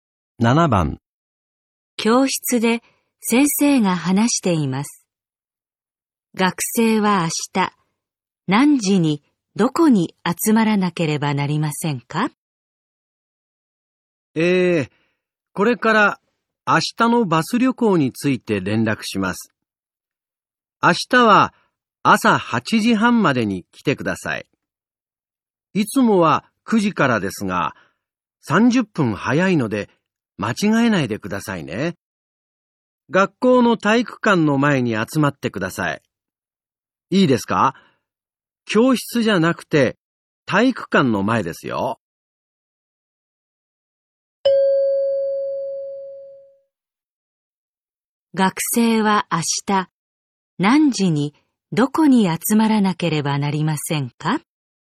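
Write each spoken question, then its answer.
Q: 学生は明日何時にどこに集まらなければなりませんか?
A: 8時半に体育館の前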